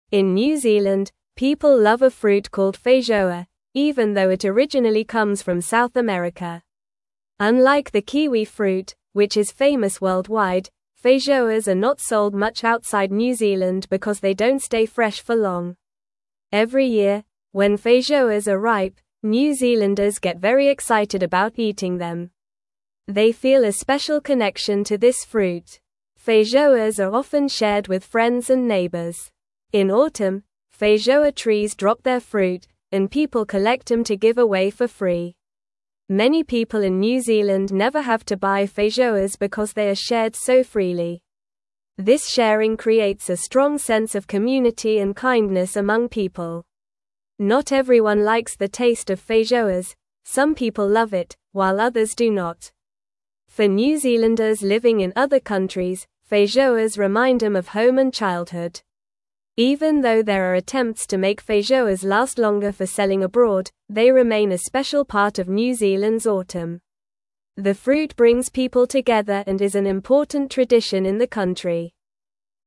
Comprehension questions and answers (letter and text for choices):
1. In New Zealand, (1)______ love a fruit (2)______ feijoa, even though it originally comes from South (3)______.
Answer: people

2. In New Zealand, (1)______ love a fruit (2)______ feijoa, even though it originally comes from South (3)______.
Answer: called

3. In New Zealand, (1)______ love a fruit (2)______ feijoa, even though it originally comes from South (3)______.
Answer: America

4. They feel a special connection to this (4)______.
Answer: fruit

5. (5)______ are often shared with friends and neighbors.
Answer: Feijoas

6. In autumn, feijoa trees (6)______ their fruit, and people collect them to give away for free.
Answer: drop

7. Many people in New Zealand never have to buy (7)______ because they are shared so freely.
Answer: feijoas

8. This sharing creates a (8)______ sense of community and kindness among people.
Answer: strong

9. For New (9)______ living in other countries, feijoas remind them of home and childhood.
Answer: Zealanders

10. Even though there are attempts to make feijoas last longer for selling abroad, they remain a special part of New Zealand's (10)______.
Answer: autumn

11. The fruit (11)______ people together and is an (12)______ tradition in the country.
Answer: brings

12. The fruit (11)______ people together and is an (12)______ tradition in the country.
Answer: important

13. Where does the feijoa fruit originally come from?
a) Australia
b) South America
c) Africa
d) Asia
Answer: b) South America

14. Why are feijoas not sold much outside New Zealand?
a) They don't stay fresh for long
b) They are too expensive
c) They are not popular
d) They are too small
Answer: a) They don't stay fresh for long

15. When do feijoas become ripe in New Zealand?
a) In winter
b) In spring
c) In autumn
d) In summer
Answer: c) In autumn

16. What do New Zealanders often do with feijoas?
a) Sell them at markets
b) Throw them away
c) Keep them for themselves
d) Share them with friends and neighbors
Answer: d) Share them with friends and neighbors

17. How do feijoas help create a sense of community?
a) By being sold at high prices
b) By being eaten alone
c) By being grown only in gardens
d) By being shared freely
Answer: d) By being shared freely

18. How do some New Zealanders feel about the taste of feijoas?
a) Some love it, some do not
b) Everyone loves it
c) No one likes it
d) Only children like it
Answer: a) Some love it, some do not

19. What do feijoas remind New Zealanders living abroad of?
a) Other fruits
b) Home and childhood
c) School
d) Work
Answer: b) Home and childhood

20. What is the role of feijoas in New Zealand's autumn?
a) They are used for decorations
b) They are ignored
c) They bring people together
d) They are only for tourists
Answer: c) They bring people together

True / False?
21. Feijoas do not remind New Zealanders living abroad of their home and childhood.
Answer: False

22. Many New Zealanders do not share feijoas with their friends and neighbors.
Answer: False

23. Feijoas are a fruit that people in New Zealand do not really like.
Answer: False

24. Feijoas stay fresh for a long time.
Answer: False

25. Feijoas come from South America, not New Zealand.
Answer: True

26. Kiwi fruit is more famous than feijoas around the world.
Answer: True

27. Some people love the taste of feijoas, while others do not like it.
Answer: True

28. In autumn, feijoa trees drop their fruit for people to collect.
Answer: True

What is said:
In New Zealand, people love a fruit called feijoa, even though it originally comes from South America. Unlike the kiwi fruit, which is famous worldwide, feijoas are not sold much outside New Zealand because they don't stay fresh for long. Every year, when feijoas are ripe, New Zealanders get very excited about eating them. They feel a special connection to this fruit.
Feijoas are often shared with friends and neighbors. In autumn, feijoa trees drop their fruit, and people collect them to give away for free. Many people in New Zealand never have to buy feijoas because they are shared so freely. This sharing creates a strong sense of community and kindness among people.
Not everyone likes the taste of feijoas; some people love it, while others do not. For New Zealanders living in other countries, feijoas remind them of home and childhood. Even though there are attempts to make feijoas last longer for selling abroad, they remain a special part of New Zealand's autumn. The fruit brings people together and is an important tradition in the country.

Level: Level 2